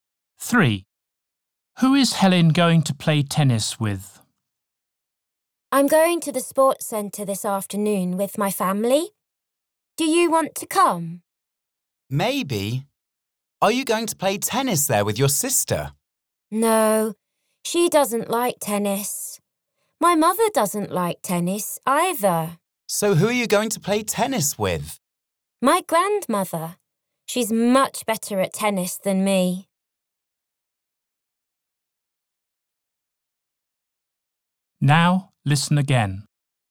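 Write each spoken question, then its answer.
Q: Who is Helen going to play tennis with?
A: Her grandmother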